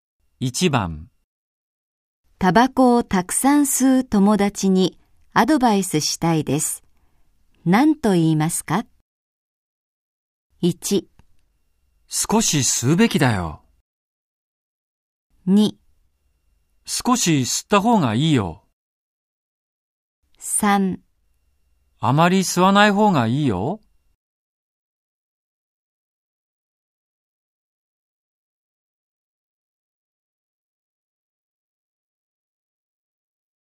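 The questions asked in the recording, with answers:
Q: タバコをたくさん吸う友達にアドバイスしたいです。何と言いますか ?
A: 3: あまり吸わない方がいいよ。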